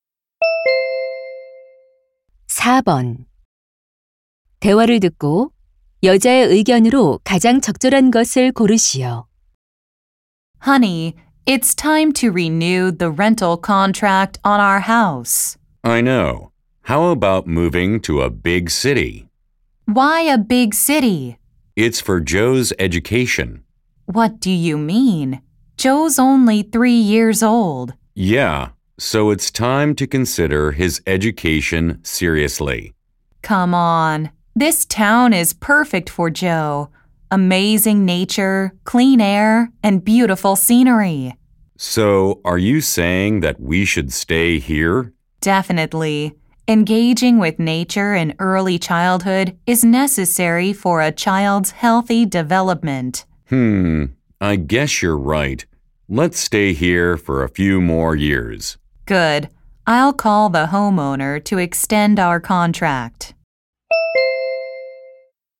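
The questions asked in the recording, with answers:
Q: 대화를 듣고 여자의 의견으로 가장 적절한 것을 고르시오.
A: 어린 시절 자연과 함께하는 것은 아이의 건강한 발달에 필요하다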